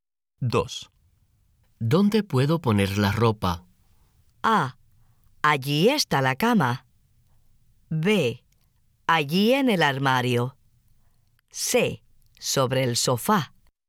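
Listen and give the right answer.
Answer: B: Allí en el armario.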